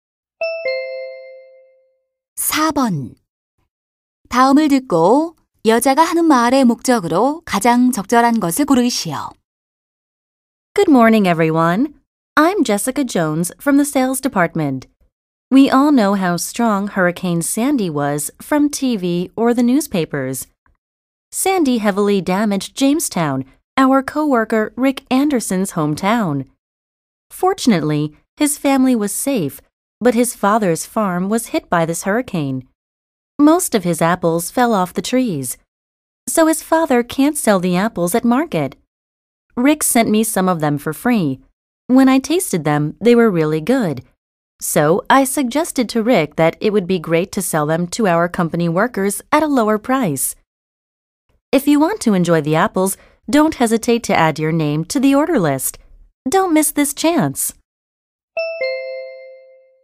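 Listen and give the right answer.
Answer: 태풍 피해를 입은 동료 가족 농장의 사과 구매를 권유하려고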